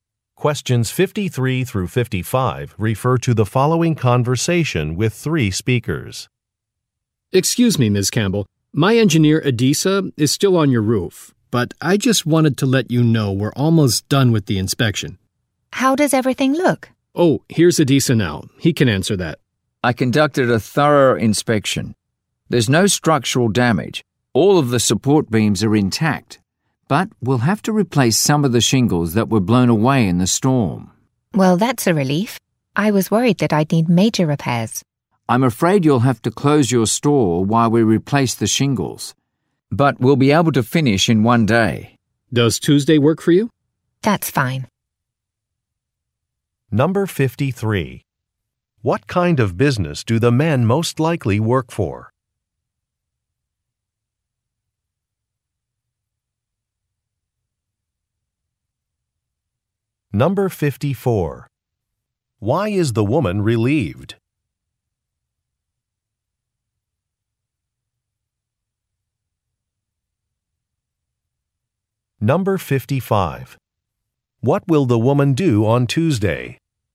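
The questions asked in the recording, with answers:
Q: What kind of business do the men most likely work for?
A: A roofing company

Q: Why is the woman relieved?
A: There is no structural damage

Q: What will the woman do on Tuesday?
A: Close her store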